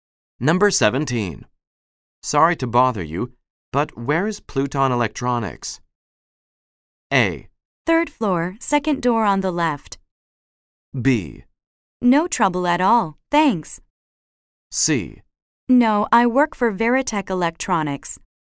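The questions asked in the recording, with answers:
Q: Sorry to bother you, but where is Pluton Electronics?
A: A: Third floor, second door on the left.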